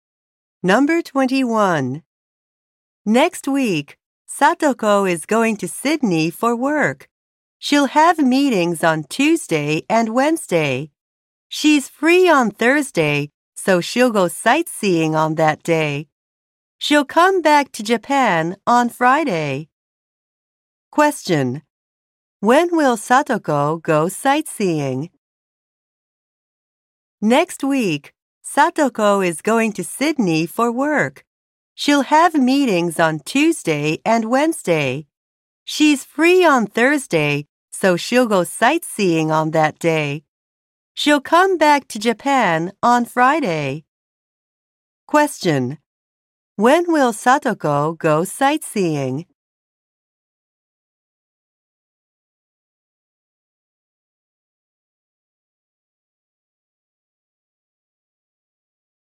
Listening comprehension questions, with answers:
When will Satoko go sightseeing?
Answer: On Thursday

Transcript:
Next week, Satoko is going to Sydney for work. She'll
have meetings on Tuesday and Wednesday. She's free on
Thursday, so she'll go sightseeing on that day. She'll
come back to Japan on Friday.
Question: When will Satoko go sightseeing?

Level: 英検3級